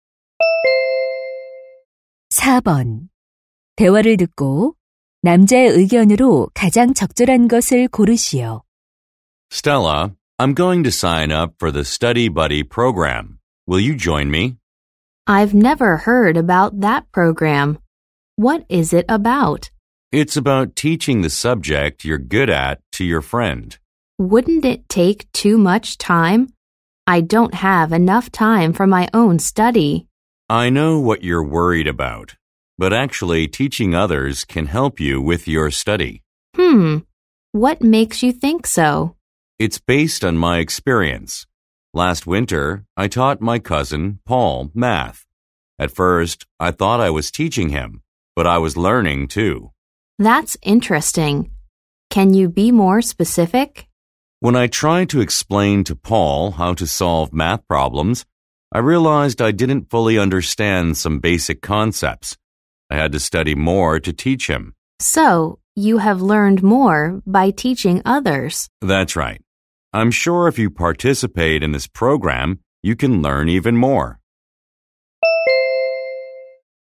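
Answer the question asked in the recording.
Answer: 다른 사람을 가르치는 것이 자신의 공부에 도움이 된다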